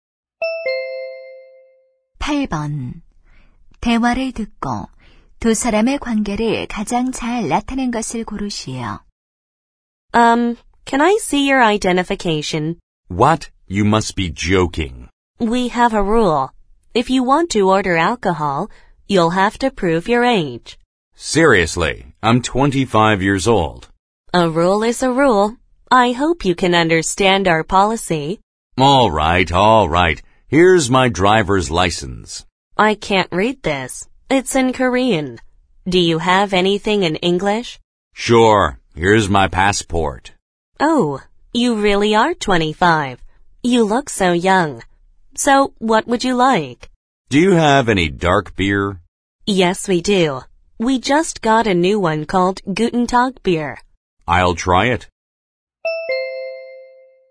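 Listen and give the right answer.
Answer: 바텐더(종업원) - 손님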